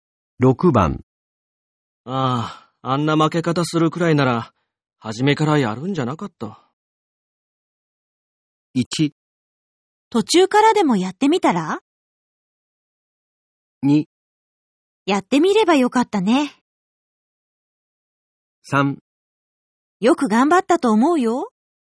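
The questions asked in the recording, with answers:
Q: ああ、あんな負け方するくらいなら、初めからやるんじゃなかった。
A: 3: よく頑張ったと思うよ。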